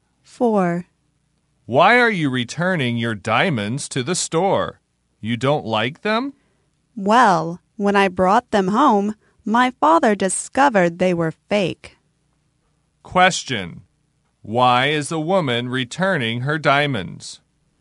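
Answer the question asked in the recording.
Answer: Her father discovered they were fake.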